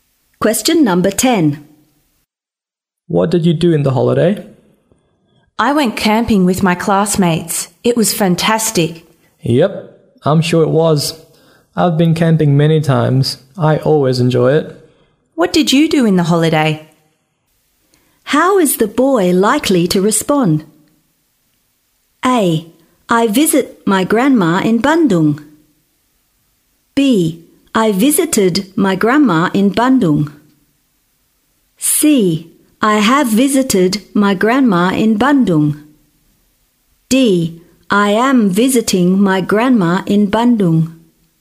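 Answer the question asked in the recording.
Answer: B: I visited my grandma in Bandung.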